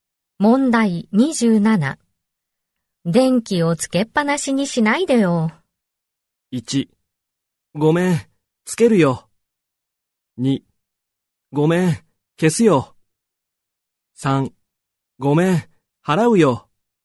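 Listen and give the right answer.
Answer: 2: ごめん、消すよ。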